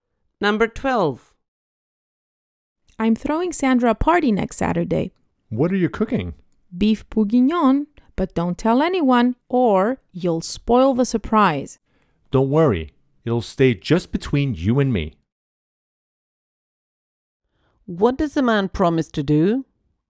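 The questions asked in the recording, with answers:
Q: What does the man promise to do?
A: Keep the party a secret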